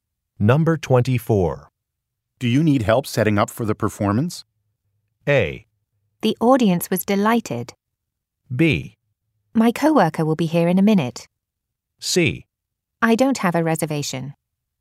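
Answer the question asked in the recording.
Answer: B: My coworker will be here in a minute.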